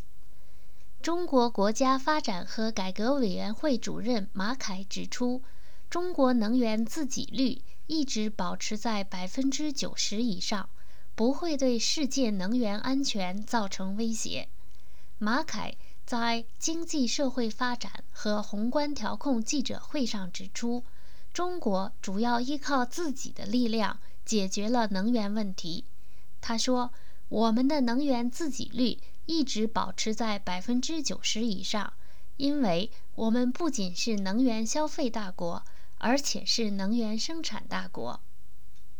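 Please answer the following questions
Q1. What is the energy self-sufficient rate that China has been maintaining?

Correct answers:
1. Over 90%

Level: M.Phil Year 2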